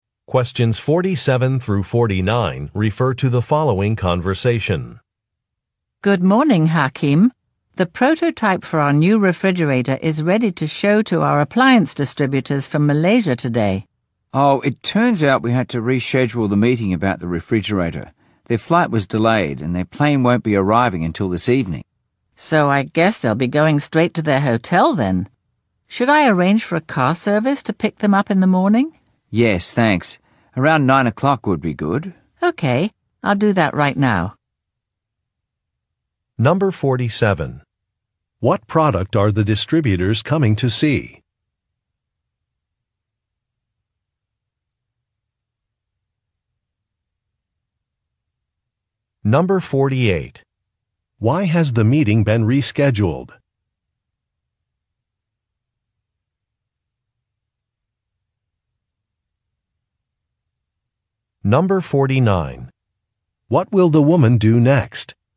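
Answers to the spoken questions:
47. A new refrigerator prototype
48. The distributors' flight was delayed
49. Arrange a car service to pick up the distributors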